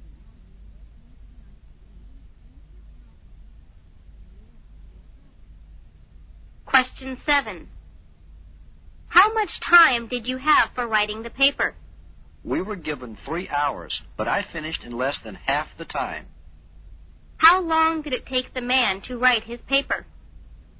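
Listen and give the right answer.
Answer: Less than one and a half hours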